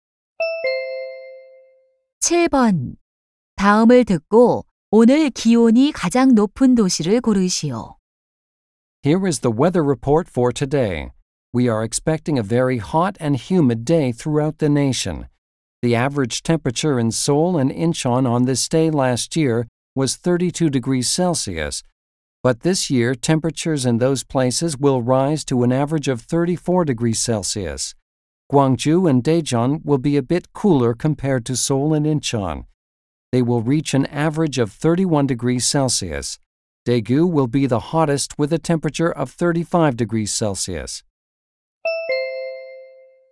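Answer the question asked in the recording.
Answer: 대구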